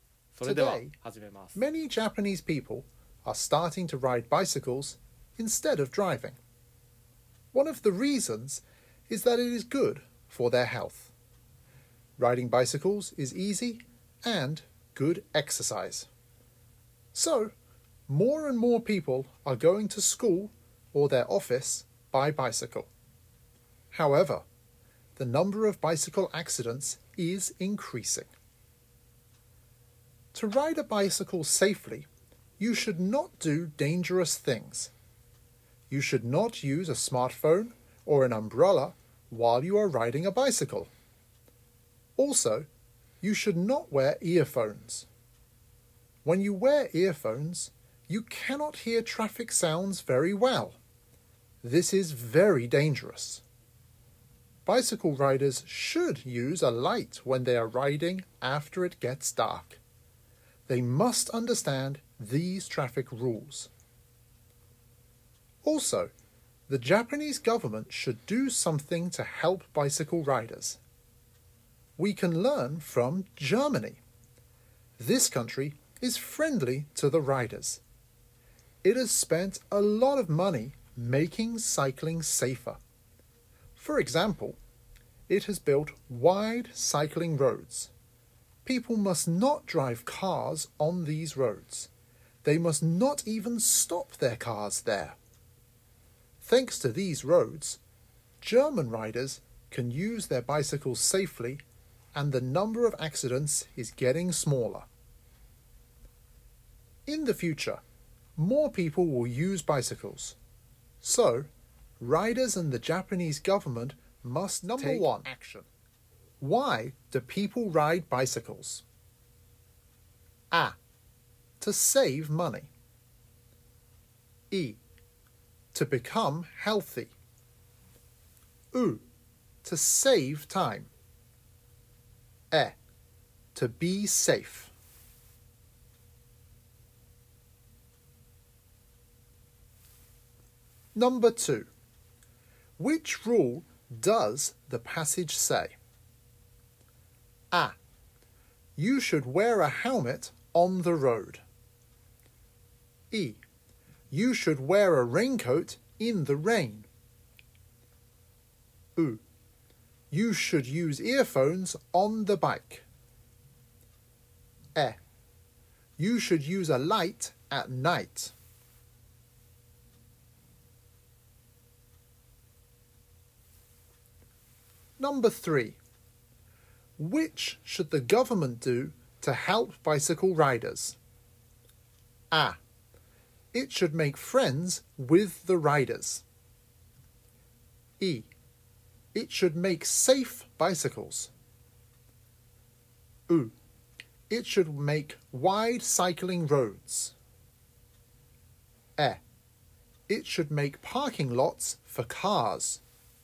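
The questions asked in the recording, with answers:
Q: Why do people ride bicycles?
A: イ: To become healthy.

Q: Which rule does the passage say?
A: エ: You should use a light at night.

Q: Which should the government do to help bicycle riders?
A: ウ: It should make wide cycling roads.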